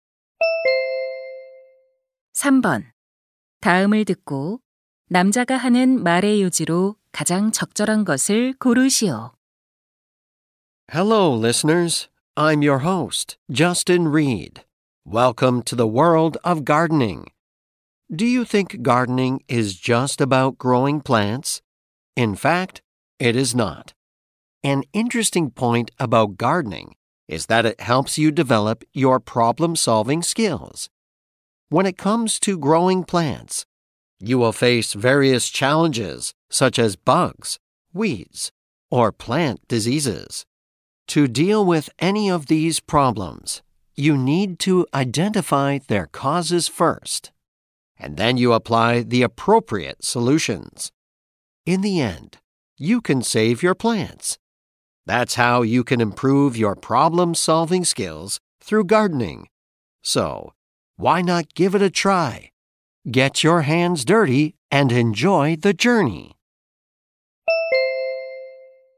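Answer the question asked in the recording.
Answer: 정원 가꾸기는 문제 해결 능력을 키우는 데 도움이 된다.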